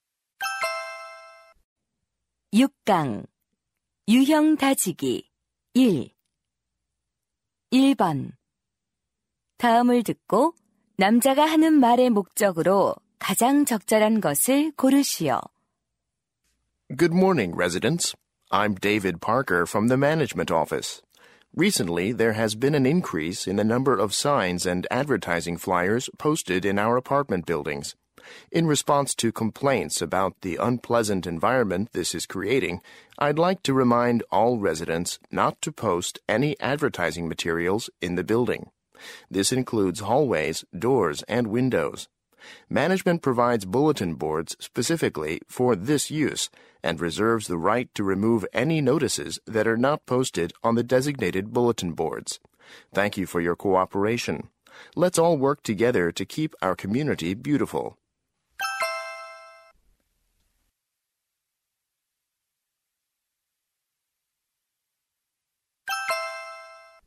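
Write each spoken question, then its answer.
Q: 다음을 듣고 남자가 하는 말의 목적으로 가장 적절한 것을 고르시오.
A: 지정된 게시판 외에 건물 내 광고물 부착 금지를 당부하려고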